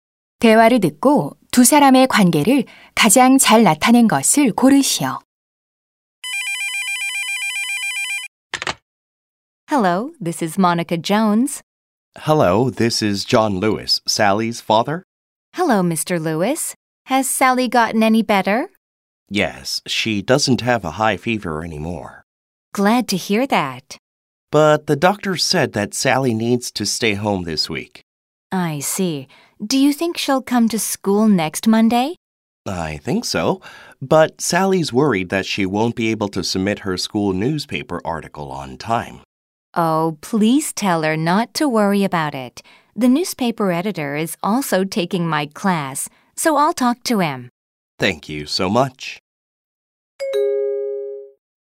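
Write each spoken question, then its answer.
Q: 대화를 듣고 두 사람의 관계를 가장 잘 나타낸 것을 고르시오.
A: 교사 - 학부모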